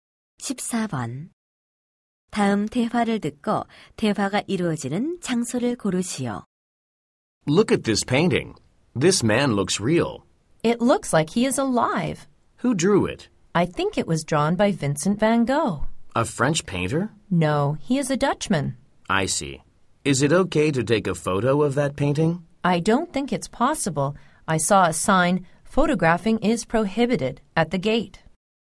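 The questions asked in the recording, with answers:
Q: 다음 대화를 듣고 대화가 이루어지는 장소를 고르시오.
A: 미술관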